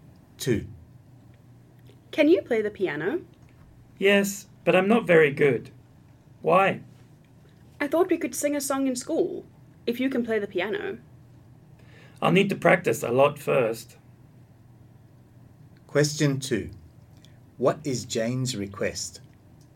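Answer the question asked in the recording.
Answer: That Mike play the piano so they can sing a song at school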